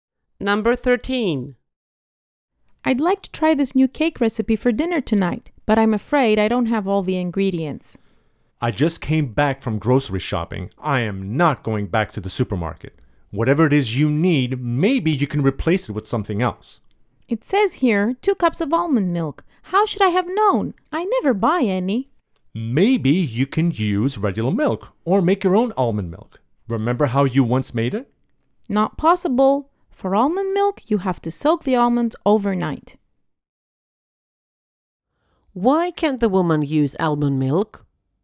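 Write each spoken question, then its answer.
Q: Why can't the woman use almond milk?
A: She has none, and making it means soaking almonds overnight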